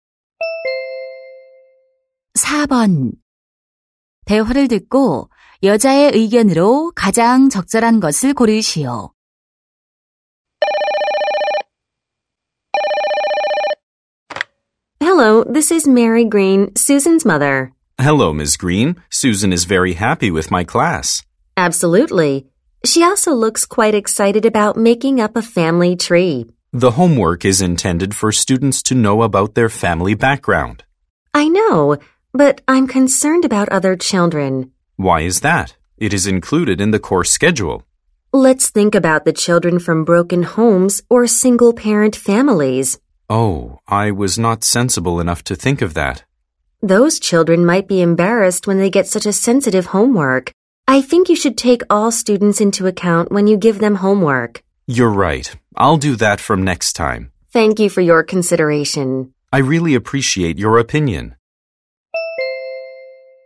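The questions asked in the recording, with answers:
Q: 대화를 듣고 여자의 의견으로 가장 적절한 것을 고르시오.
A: 숙제를 낼 때 모든 학생을 고려해야 한다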